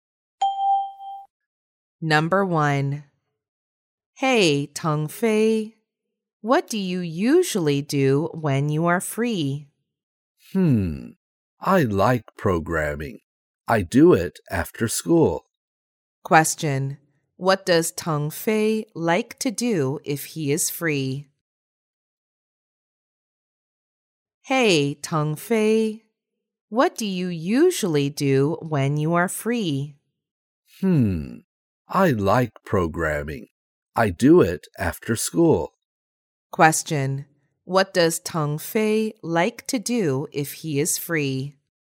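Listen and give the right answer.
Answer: Programming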